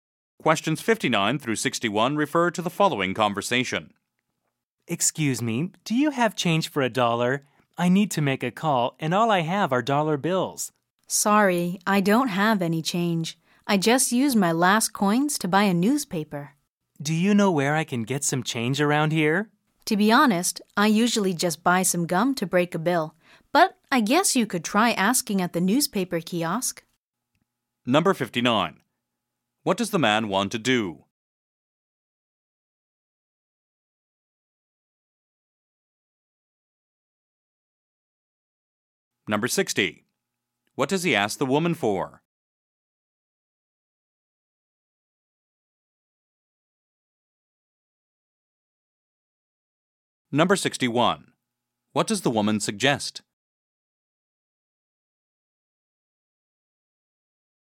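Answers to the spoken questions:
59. Make a phone call
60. Change for a dollar
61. Asking at the newspaper kiosk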